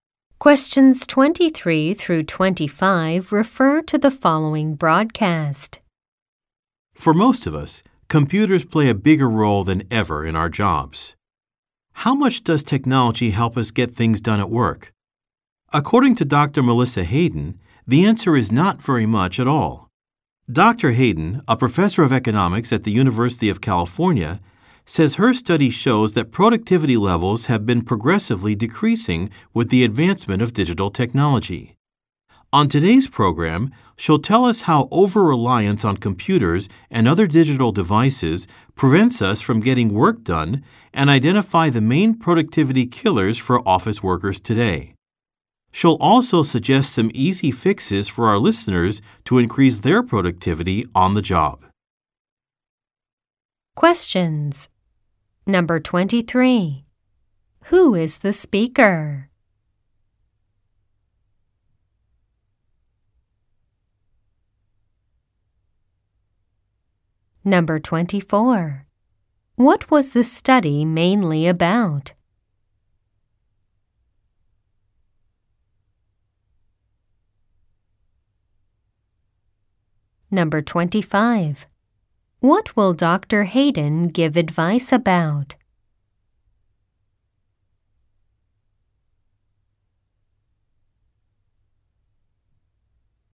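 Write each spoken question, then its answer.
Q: What was the study mainly about?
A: How digital technology affects workplace productivity

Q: What will Dr. Hayden give advice about?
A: Easy ways to increase productivity at work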